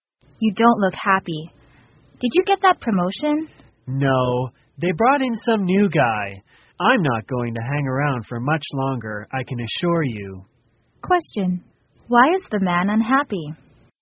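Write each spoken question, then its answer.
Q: Why is the man unhappy?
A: He didn't get the promotion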